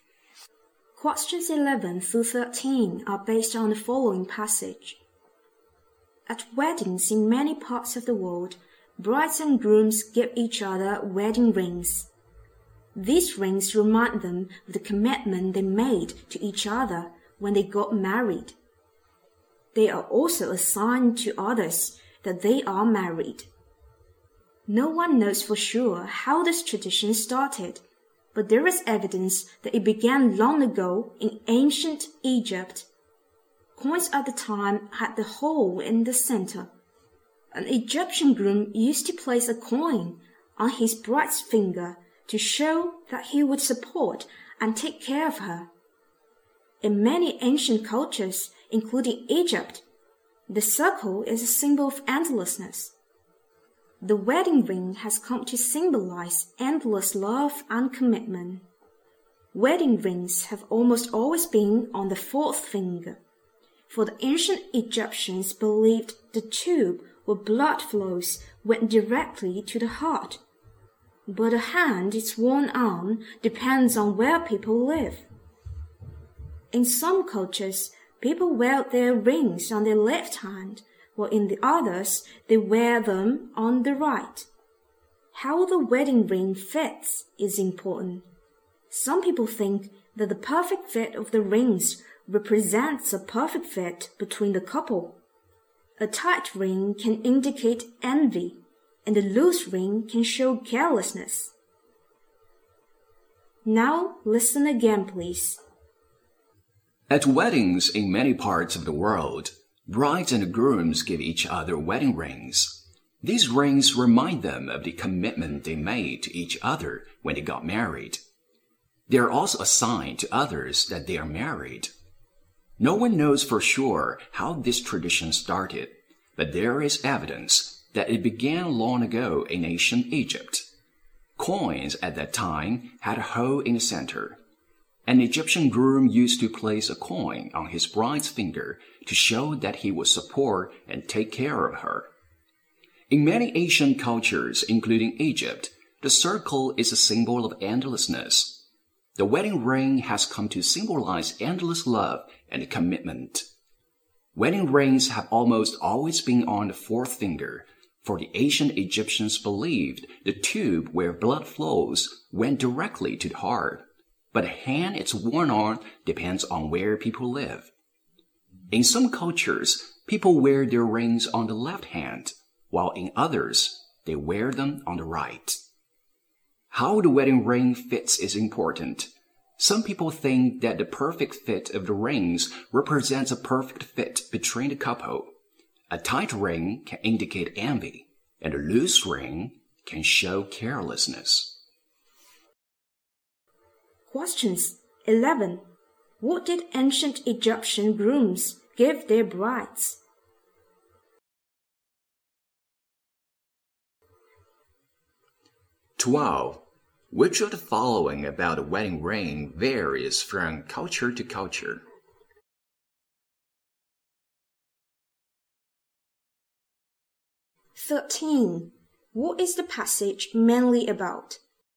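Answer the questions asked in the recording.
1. A coin.
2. Which hand it is worn on.
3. The origin and meaning of wedding rings.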